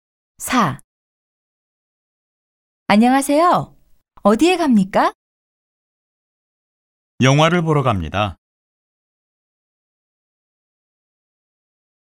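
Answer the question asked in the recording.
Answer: 극장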